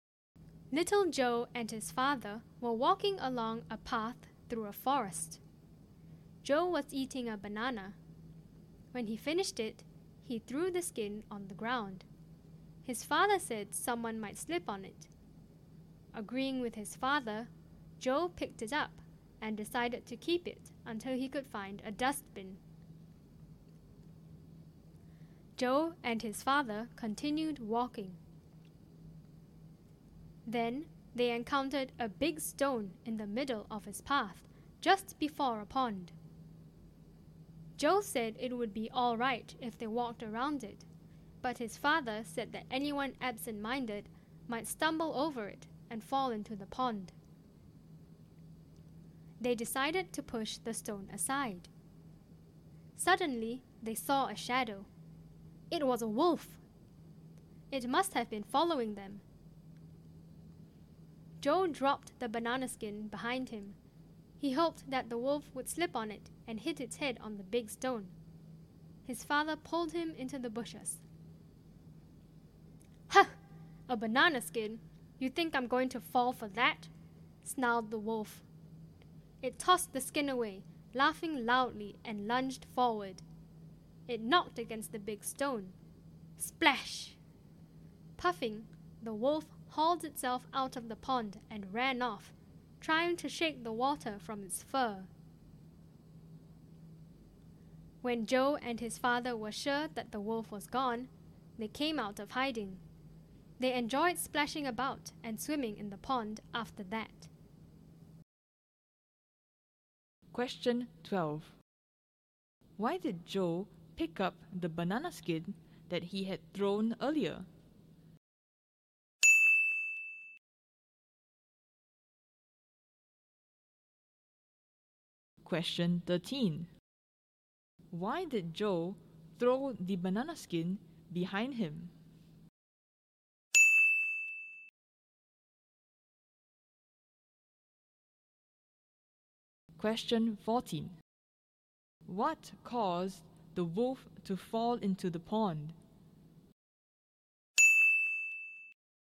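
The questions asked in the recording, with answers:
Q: Why did Joe pick up the banana skin that he had thrown earlier?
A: His father said someone might slip on it

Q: Why did Joe throw the banana skin behind him?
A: He hoped the wolf would slip on it and hit its head on the big stone

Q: What caused the wolf to fall into the pond?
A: It knocked against the big stone as it lunged forward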